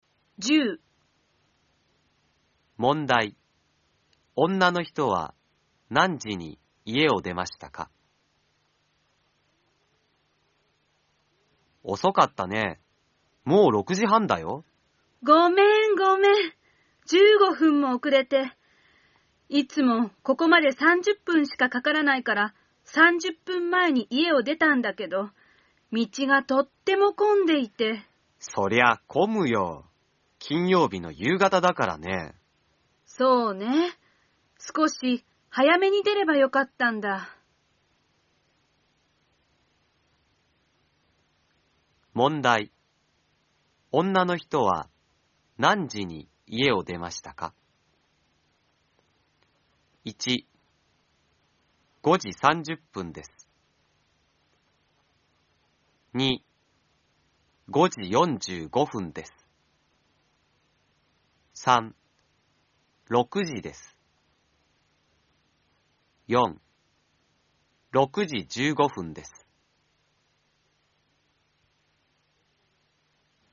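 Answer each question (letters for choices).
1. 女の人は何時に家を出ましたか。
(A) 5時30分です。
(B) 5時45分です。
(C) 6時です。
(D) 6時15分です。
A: C

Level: N4 ĐỀ 2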